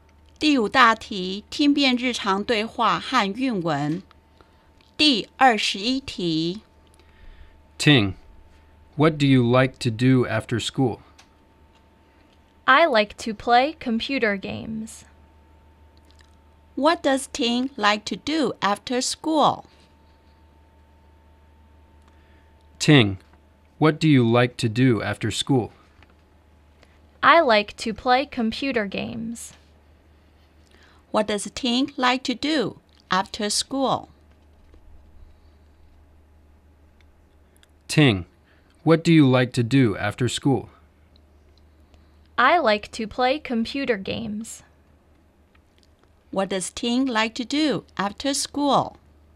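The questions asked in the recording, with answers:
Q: What does Ting like to do after school?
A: Play computer games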